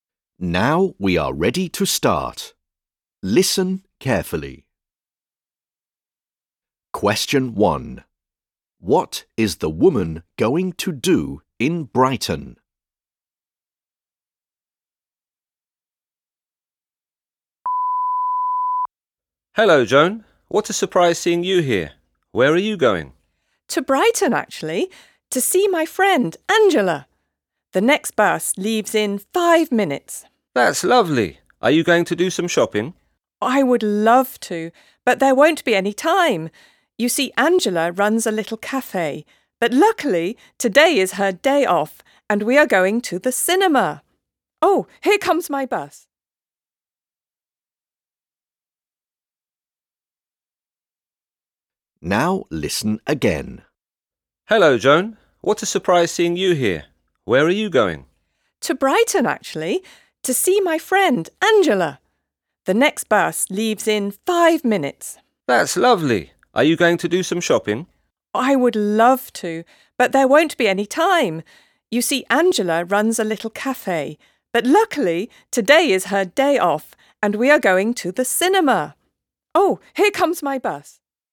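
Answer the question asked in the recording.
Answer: Go to the cinema with her friend Angela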